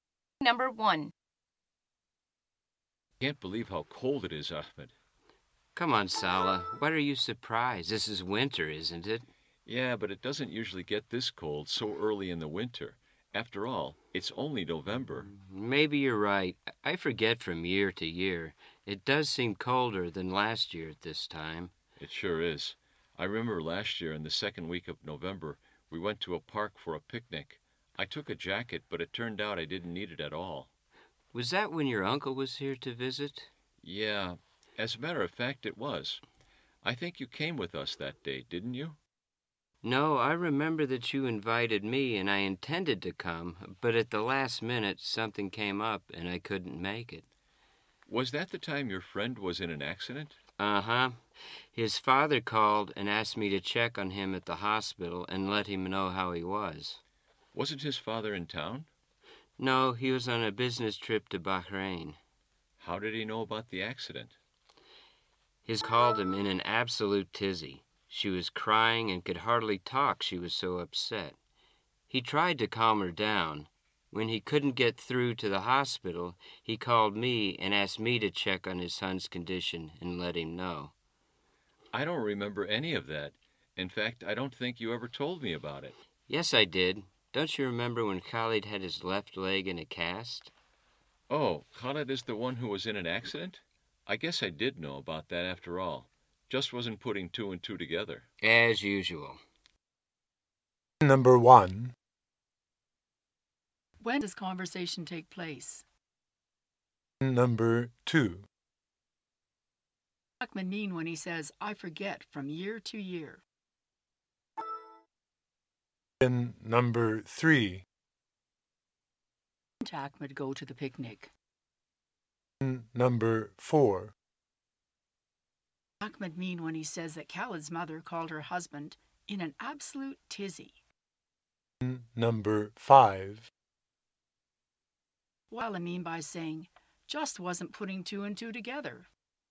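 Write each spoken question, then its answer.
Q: When does conversation take place?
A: In November, early winter

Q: What does Ahmed mean when he says, I forget from year to year?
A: He doesn't remember how cold it was in previous years

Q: What does he mean by saying, just wasn't putting two and two together?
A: He hadn't connected the facts about Khalid's accident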